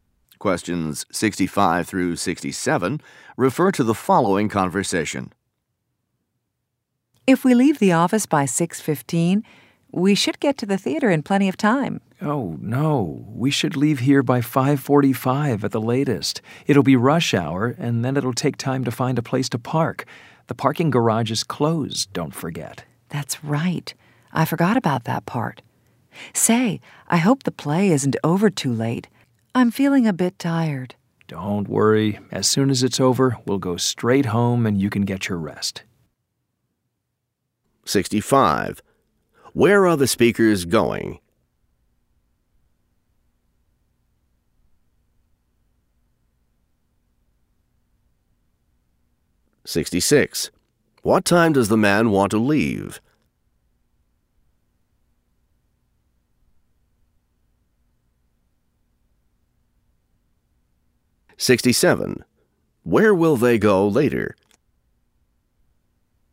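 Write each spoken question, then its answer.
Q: Where are the speakers going?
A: To the theater

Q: Where will they go later?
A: Home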